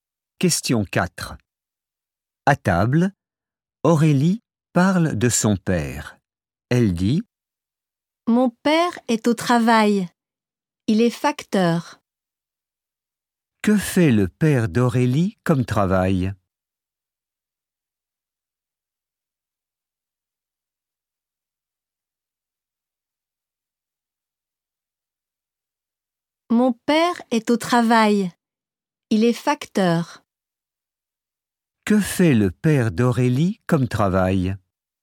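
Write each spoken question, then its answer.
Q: Que fait le père d'Aurélie comme travail?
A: Il est facteur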